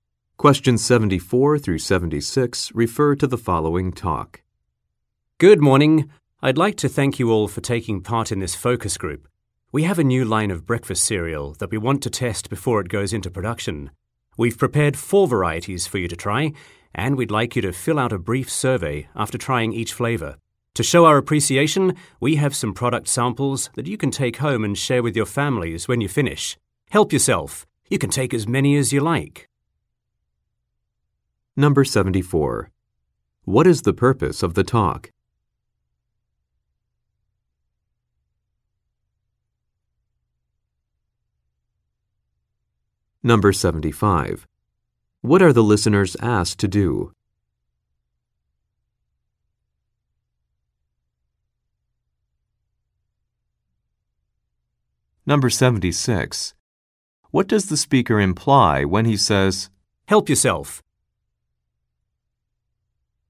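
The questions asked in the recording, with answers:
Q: What is the purpose of the talk?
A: To have a focus group test new breakfast cereals

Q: What are the listeners asked to do?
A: Fill out a brief survey after trying each flavor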